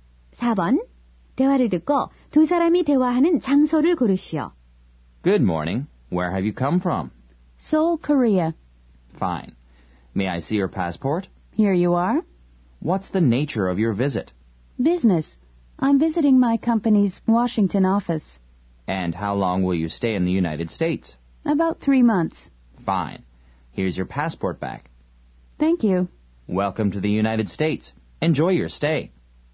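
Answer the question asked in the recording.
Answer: 공항 입국 심사대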